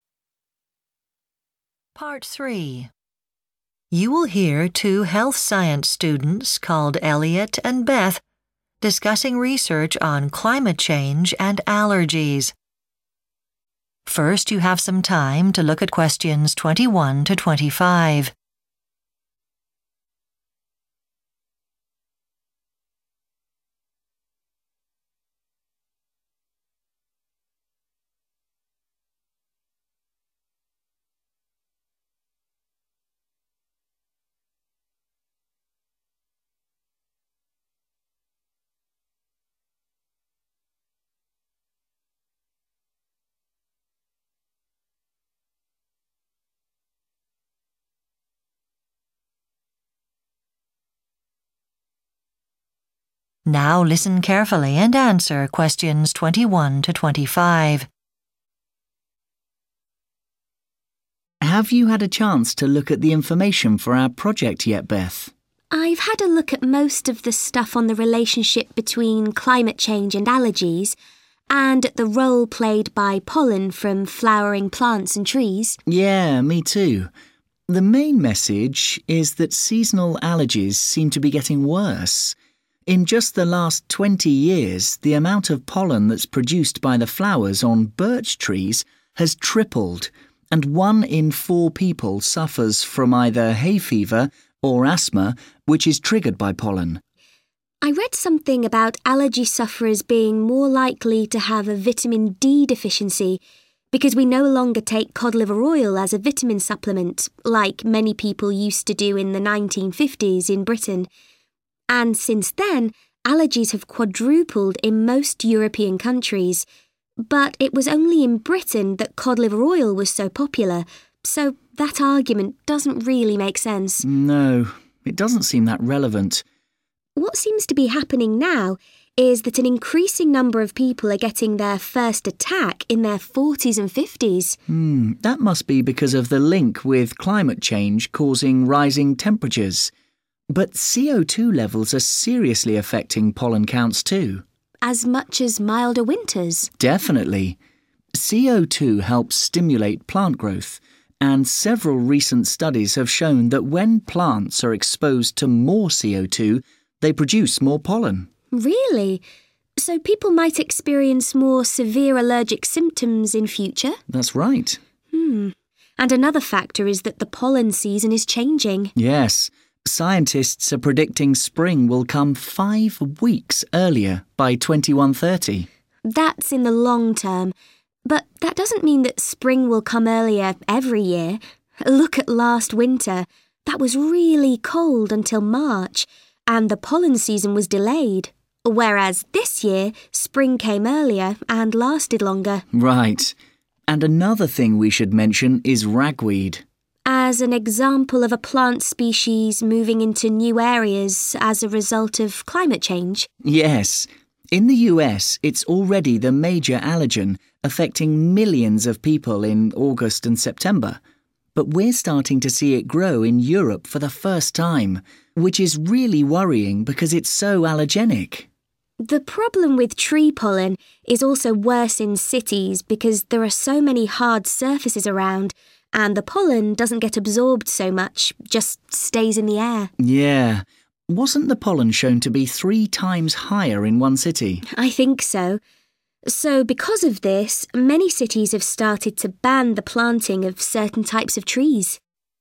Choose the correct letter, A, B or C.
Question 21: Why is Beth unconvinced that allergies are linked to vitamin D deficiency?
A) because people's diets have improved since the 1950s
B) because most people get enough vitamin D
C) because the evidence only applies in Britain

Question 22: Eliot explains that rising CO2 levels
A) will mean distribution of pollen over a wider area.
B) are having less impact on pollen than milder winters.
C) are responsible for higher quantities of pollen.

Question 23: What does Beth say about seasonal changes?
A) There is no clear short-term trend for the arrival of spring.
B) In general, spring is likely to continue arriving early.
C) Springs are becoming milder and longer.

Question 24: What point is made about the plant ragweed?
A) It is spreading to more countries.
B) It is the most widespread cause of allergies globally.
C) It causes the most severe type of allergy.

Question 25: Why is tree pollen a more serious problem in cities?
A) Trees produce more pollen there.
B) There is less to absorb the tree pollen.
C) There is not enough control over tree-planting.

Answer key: 21C, 22C, 23A, 24A, 25B

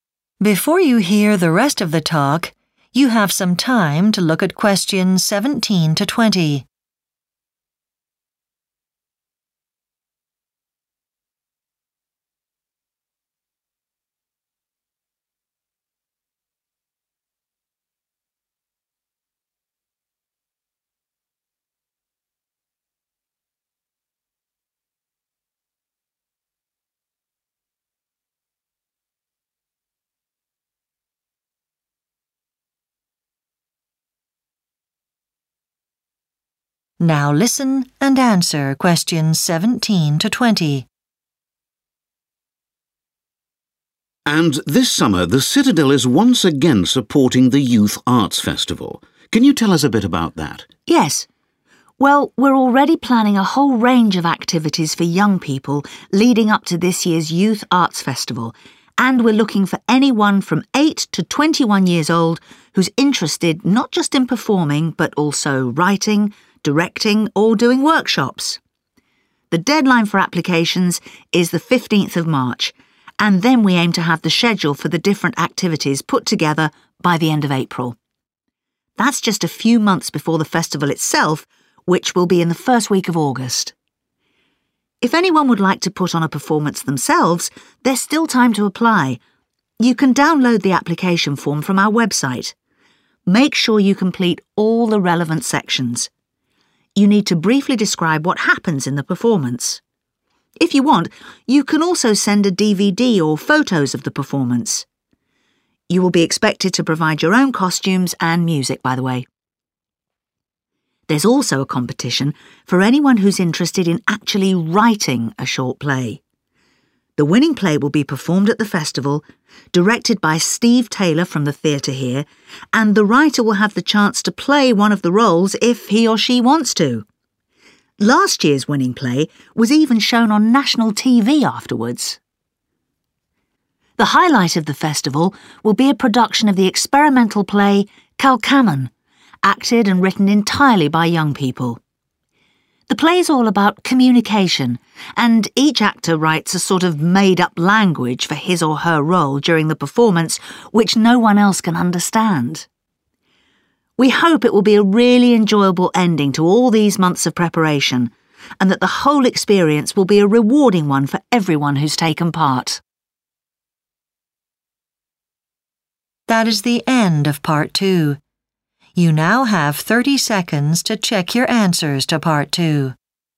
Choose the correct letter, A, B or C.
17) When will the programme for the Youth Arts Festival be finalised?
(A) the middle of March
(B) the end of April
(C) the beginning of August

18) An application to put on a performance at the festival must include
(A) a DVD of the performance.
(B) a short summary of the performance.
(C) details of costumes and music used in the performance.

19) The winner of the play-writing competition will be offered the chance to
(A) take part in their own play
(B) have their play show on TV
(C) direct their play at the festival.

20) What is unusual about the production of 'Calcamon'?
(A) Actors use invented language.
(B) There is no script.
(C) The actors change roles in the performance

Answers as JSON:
{"17": "B", "18": "B", "19": "A", "20": "A"}

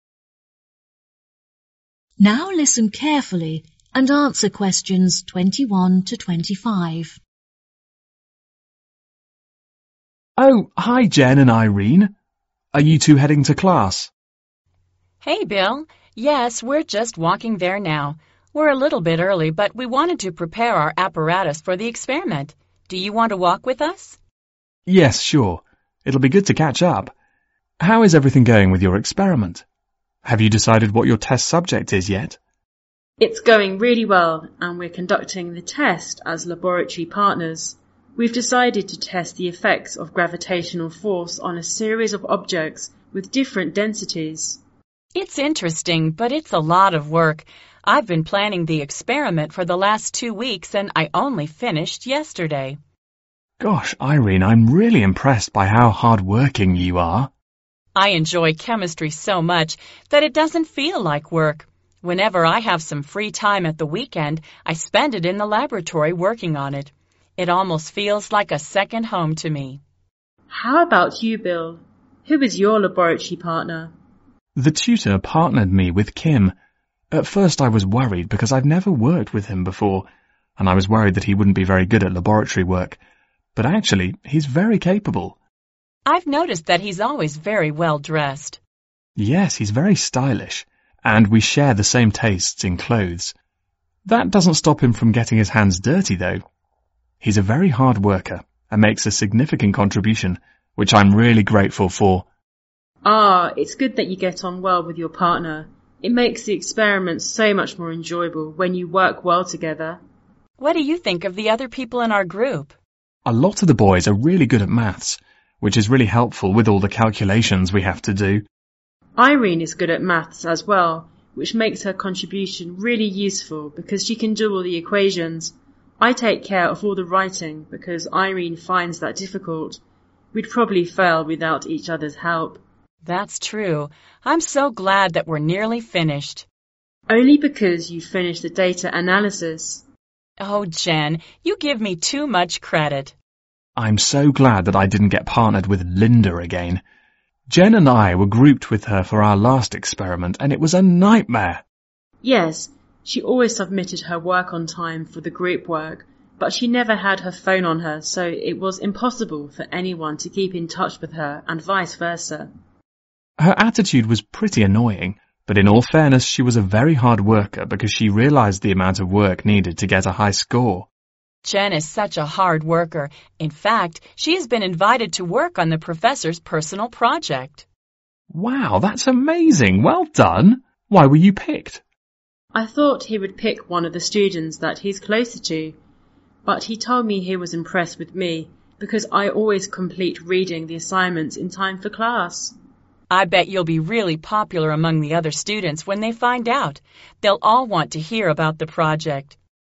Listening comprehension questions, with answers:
Choose the correct answer.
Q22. What is Bill's attitude toward Kim?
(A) He is grateful for Kim's contribution.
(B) He is not fond of Kim's tastes in clothes.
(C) He thinks Kim is not good at laboratory work.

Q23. What does Jen think of the other people in the group?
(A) The boys are good at maths which is very helpful.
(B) They would fail the experiment without Irene's contribution.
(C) Irene has completed the data analysis so the experiment is nearly done.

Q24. How did Jen and Bill feel about Linda?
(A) She always submitted her work late for the group work.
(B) She was difficult to get in touch with.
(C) She thought it was easy to get a high score.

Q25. Why was Jen invited to the professor's individual project?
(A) She was quite popular among students.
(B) She always finished reading all the assignments.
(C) She was close to the professor.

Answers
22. A
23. A
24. B
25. B

